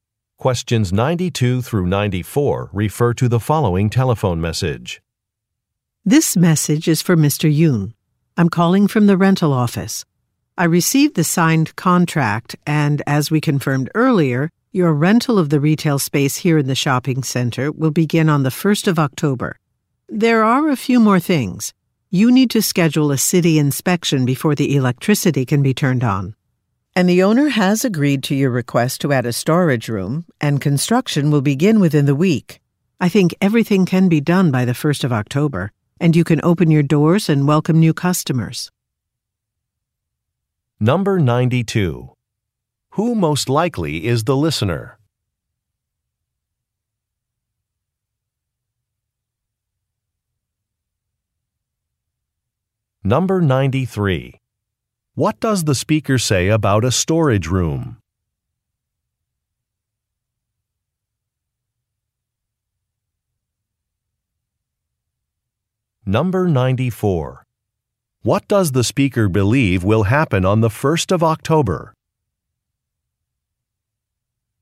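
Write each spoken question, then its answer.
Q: Who most likely is the listener?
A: A store owner

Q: What does the speaker say about a storage room?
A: Construction will begin within the week

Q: What does the speaker believe will happen on the 1st of October?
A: The listener's store will open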